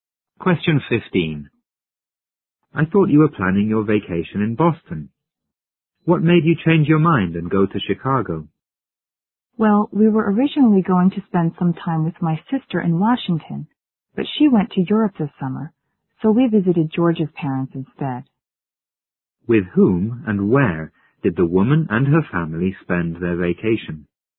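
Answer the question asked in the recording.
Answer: With George's parents in Chicago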